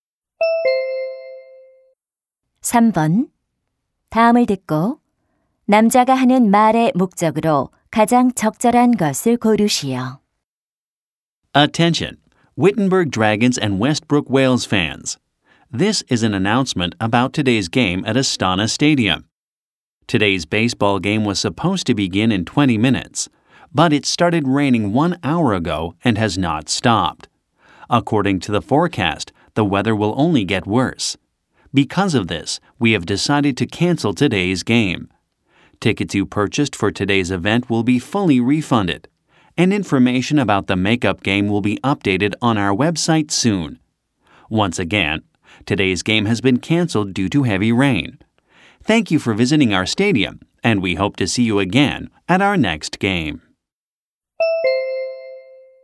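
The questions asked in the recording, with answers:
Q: 다음을 듣고 남자가 하는 말의 목적으로 가장 적절한 것을 고르시오.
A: 비로 인한 오늘 야구 경기 취소를 알리려고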